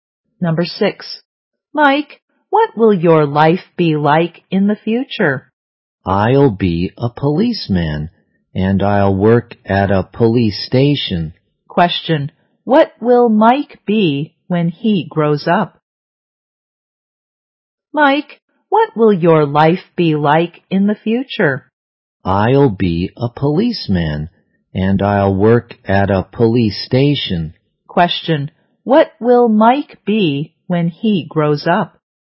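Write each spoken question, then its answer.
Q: what will Mike be when he grows up?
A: A policeman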